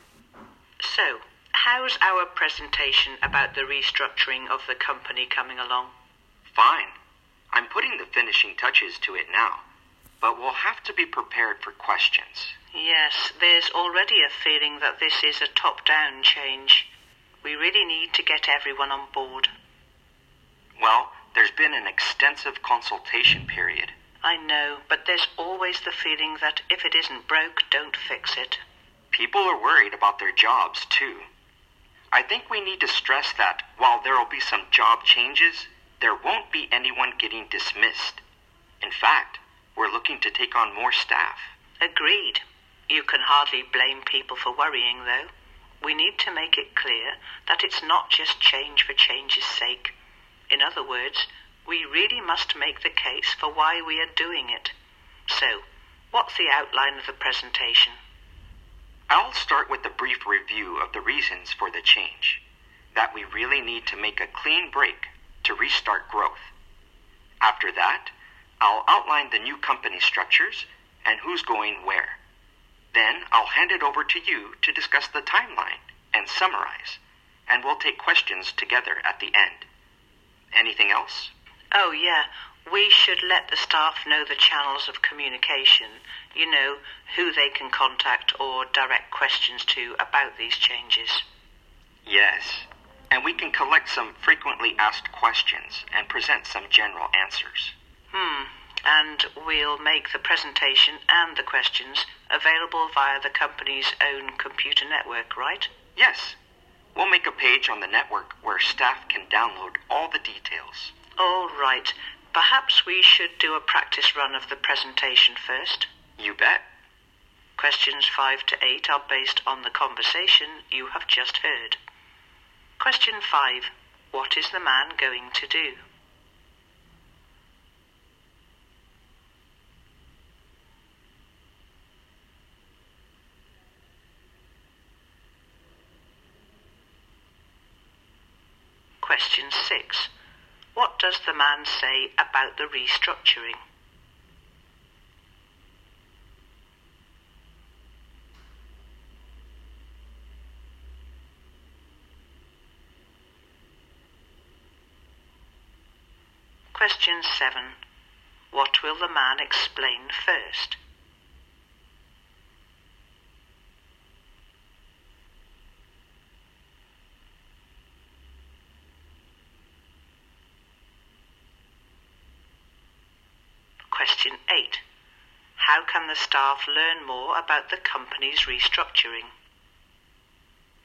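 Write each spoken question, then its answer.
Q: How can the staff learn more about the company's restructuring?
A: By downloading the details from a page on the company's computer network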